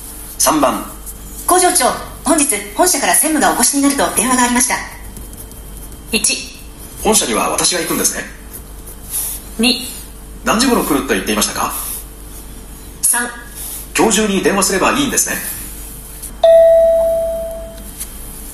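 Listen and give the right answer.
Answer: 2: 何時頃来ると言っていましたか。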